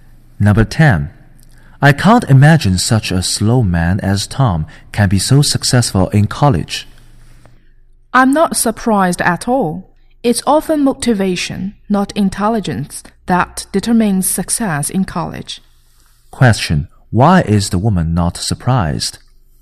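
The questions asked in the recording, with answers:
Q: Why is the woman not surprised?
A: Because motivation, not intelligence, often determines success in college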